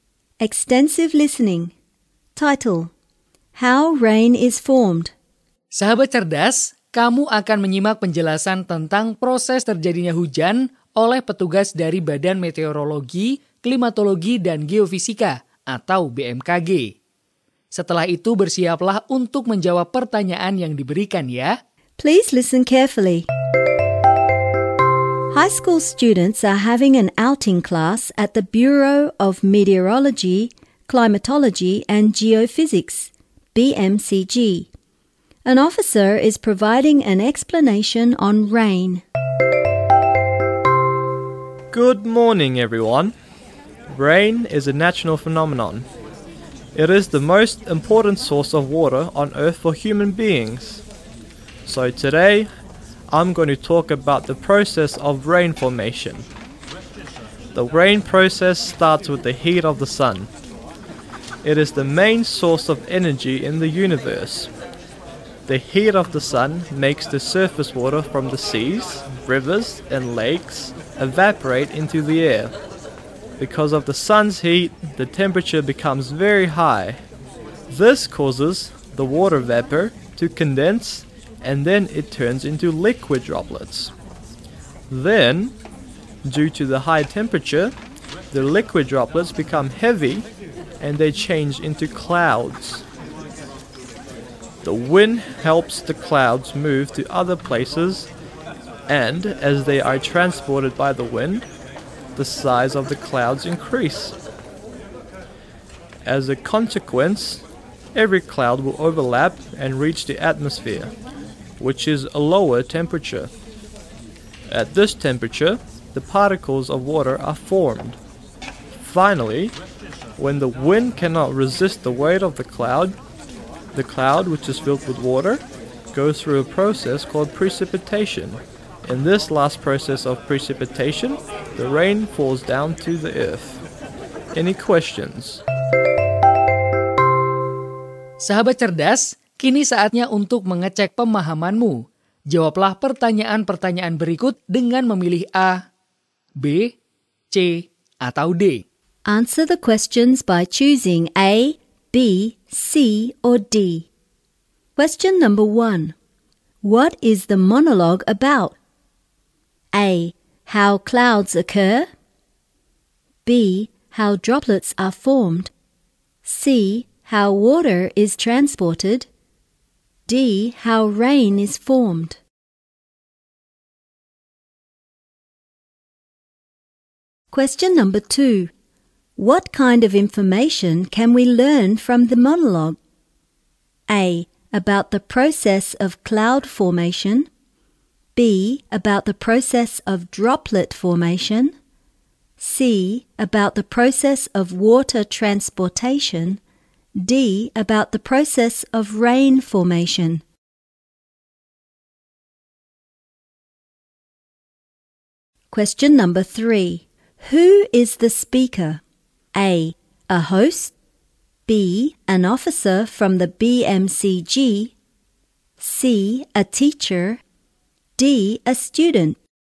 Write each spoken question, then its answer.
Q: What is the monologue about?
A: D. How rain is formed.

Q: What kind of information can we learn from the monologue?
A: D. About the process of rain formation.